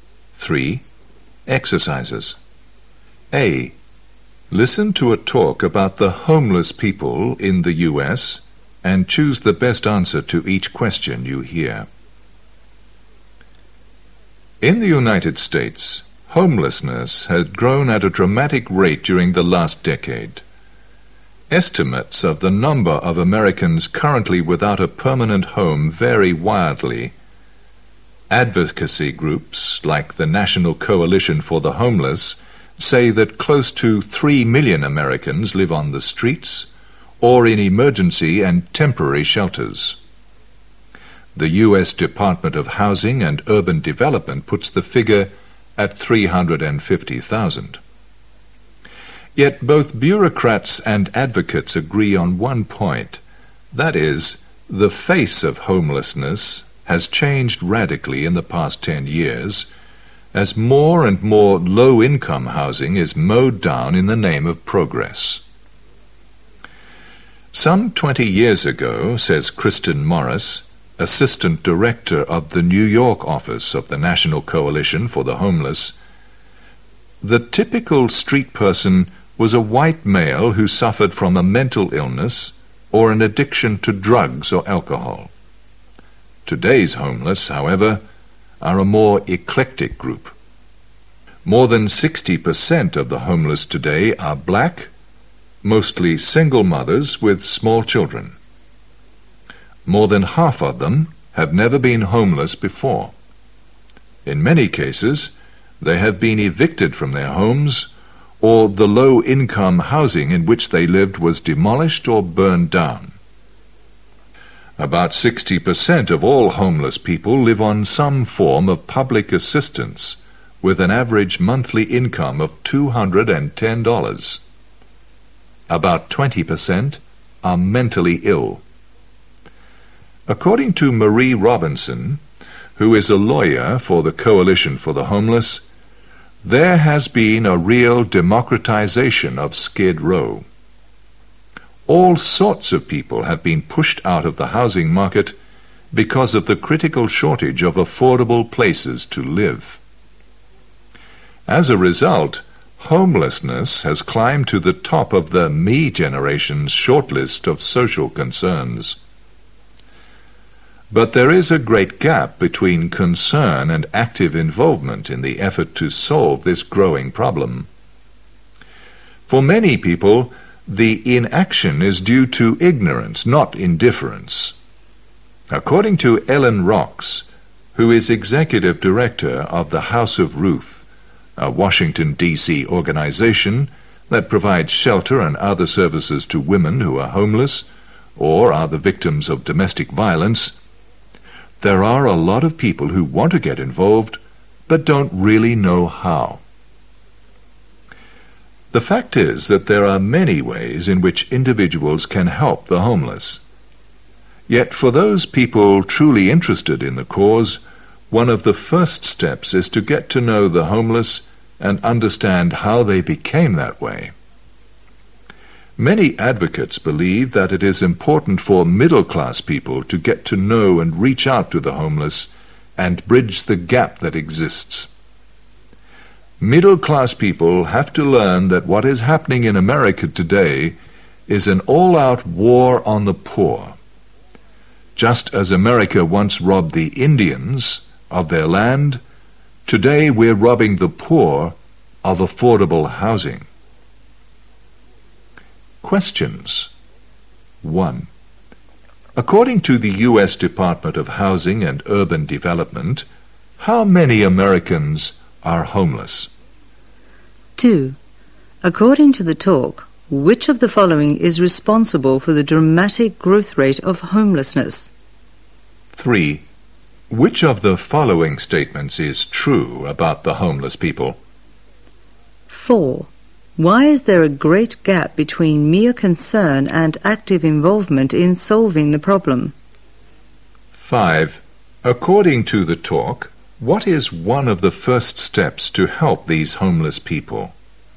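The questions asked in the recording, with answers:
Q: Why is there a great gap between mere concern and active involvement in solving the problem?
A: Because of ignorance, not indifference: many people want to get involved but don't know how

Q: According to the talk, what is one of the first steps to help these homeless people?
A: To get to know the homeless and understand how they became that way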